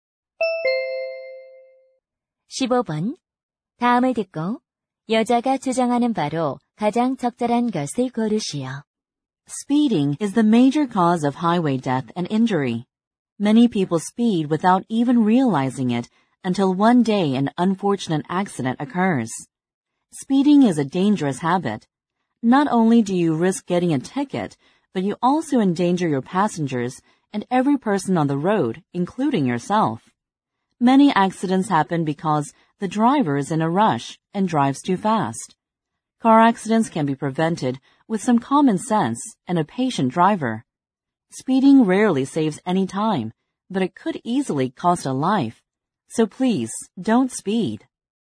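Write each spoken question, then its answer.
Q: 다음을 듣고 여자가 주장하는 바로 가장 적절한 것을 고르시오.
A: 과속 운전을 하지 말아야 한다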